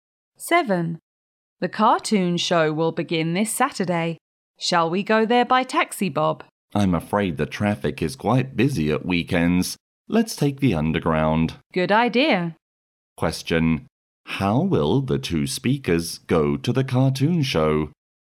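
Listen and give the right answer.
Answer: By underground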